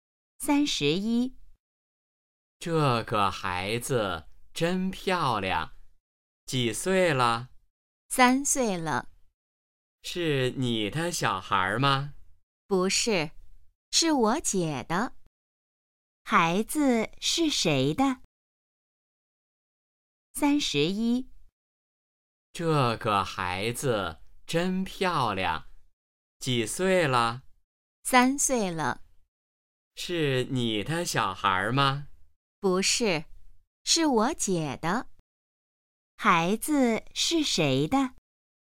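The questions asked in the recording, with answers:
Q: 孩子是谁的?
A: 她姐姐的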